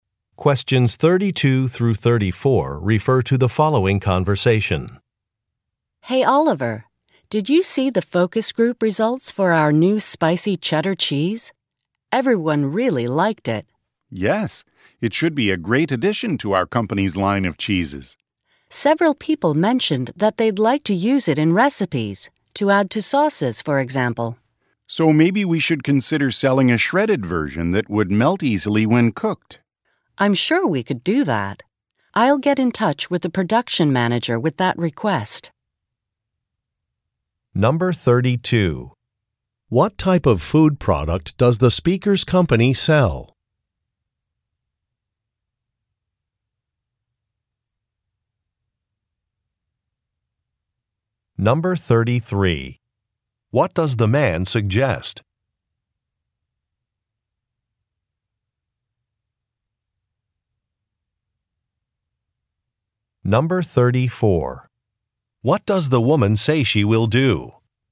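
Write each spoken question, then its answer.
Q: What type of food product does the speaker's company sell?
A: Cheese

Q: What does the man suggest?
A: Selling a shredded version of the cheese

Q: What does the woman say she will do?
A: Contact the production manager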